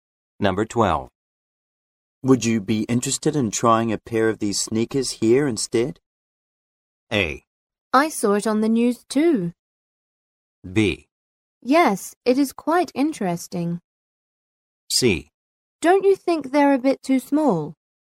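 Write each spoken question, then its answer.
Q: Would you be interested in trying a pair of these sneakers here instead?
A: C: Don't you think they're a bit too small?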